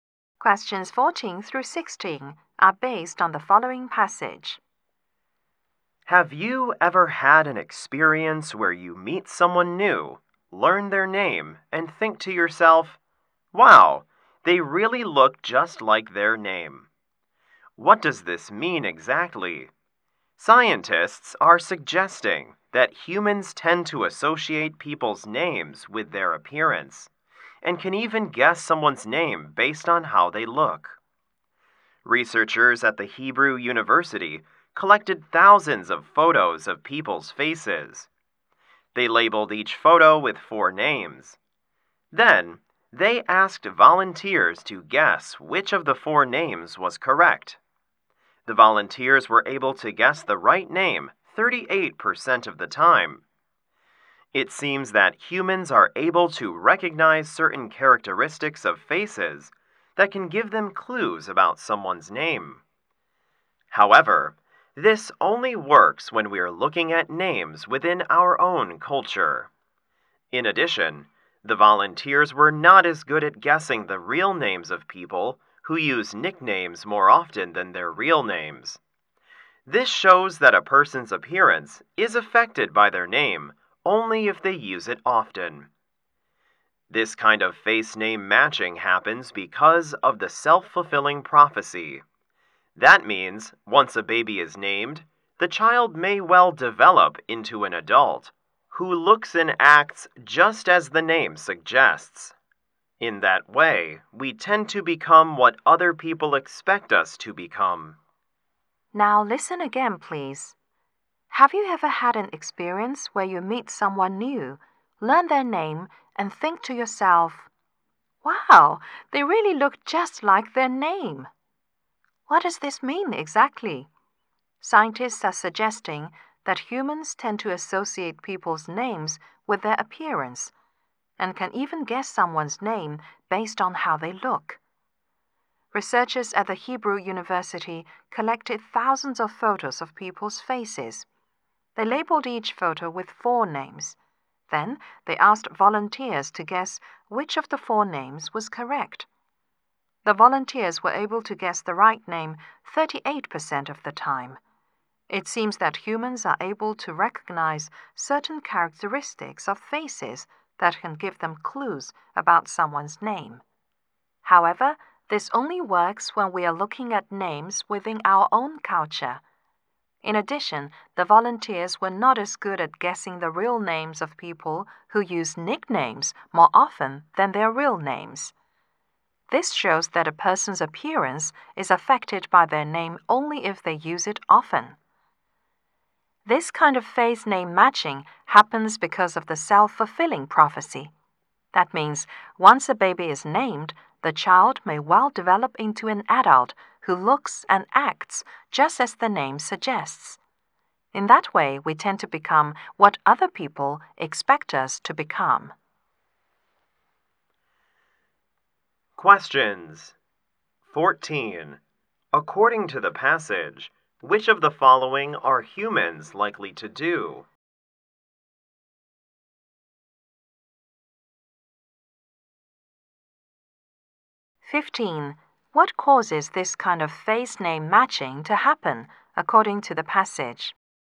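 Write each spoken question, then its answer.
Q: What causes this kind of face name matching to happen, according to the passage?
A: The self-fulfilling prophecy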